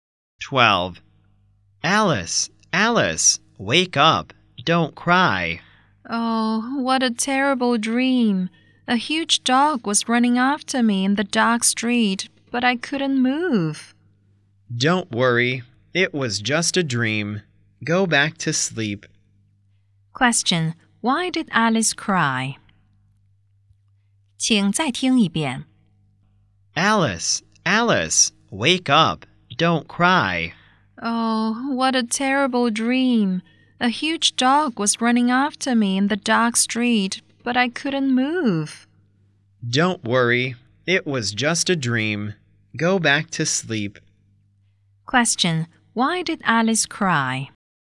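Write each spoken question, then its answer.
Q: Question: Why did Alice cry?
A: She had a terrible dream about a huge dog chasing her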